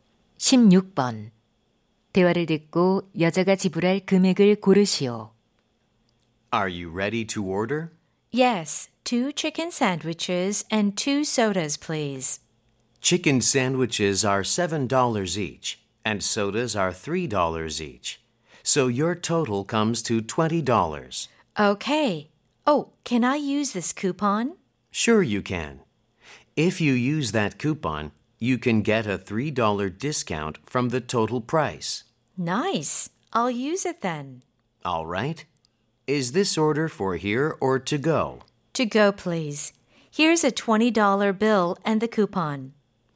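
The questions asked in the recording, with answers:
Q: 대화를 듣고 여자가 지불할 금액을 고르시오.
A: 17달러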